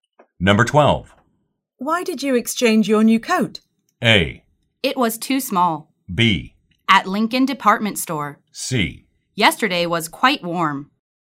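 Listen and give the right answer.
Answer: A: It was too small.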